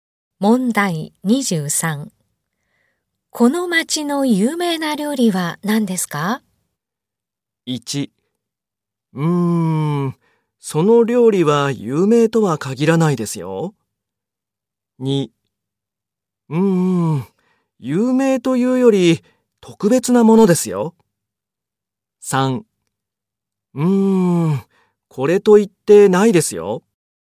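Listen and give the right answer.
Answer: 3: これと言ってないですよ。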